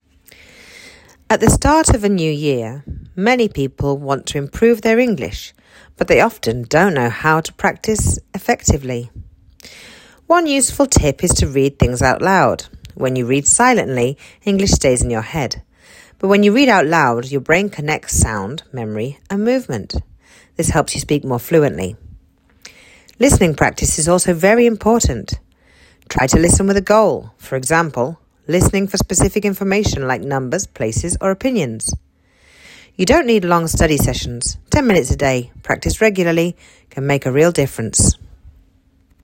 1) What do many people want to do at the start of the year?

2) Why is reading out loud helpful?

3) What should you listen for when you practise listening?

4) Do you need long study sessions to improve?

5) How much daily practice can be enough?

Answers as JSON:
{"1": "They want to improve their English.", "2": "Because it helps connect sound, memory and movement, which helps fluency.", "3": "You should listen for specific information, such as numbers, places or opinions.", "4": "No, you don't need long study sessions to improve.", "5": "About ten minutes a day can be enough if you practise regularly."}